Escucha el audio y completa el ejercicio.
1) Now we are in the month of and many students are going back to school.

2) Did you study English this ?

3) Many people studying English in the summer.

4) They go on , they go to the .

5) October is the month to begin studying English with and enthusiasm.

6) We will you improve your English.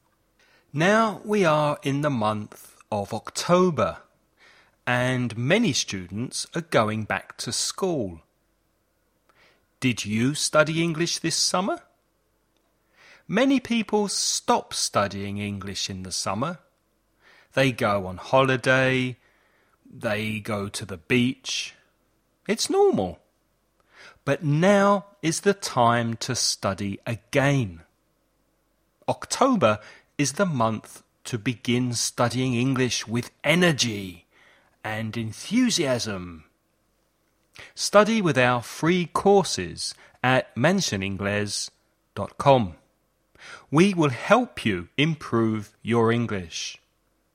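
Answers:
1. October
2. summer
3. stop
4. holiday; beach
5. energy
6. help

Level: nivel básico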